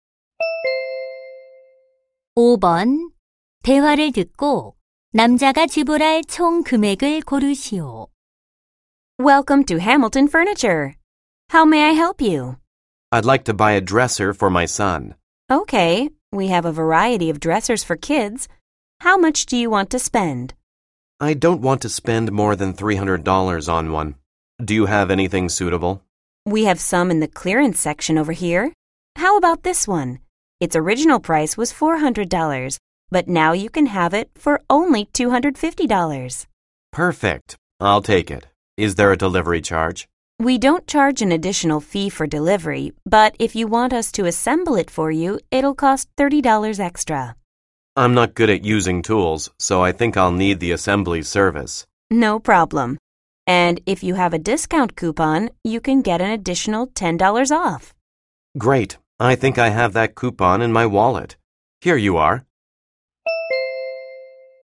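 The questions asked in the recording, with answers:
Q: 대화를 듣고 남자가 지불할 총 금액을 고르시오.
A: $270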